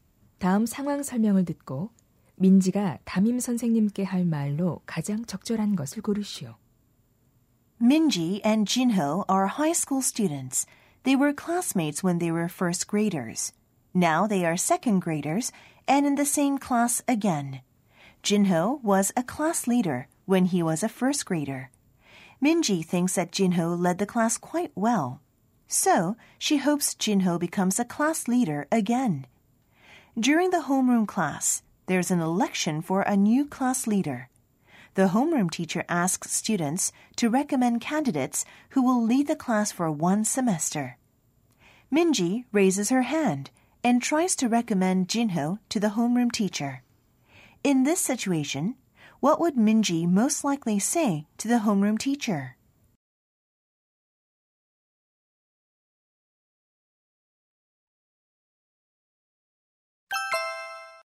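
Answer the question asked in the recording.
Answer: I'd like to recommend Jinho as our class leader, since he led the class well last year.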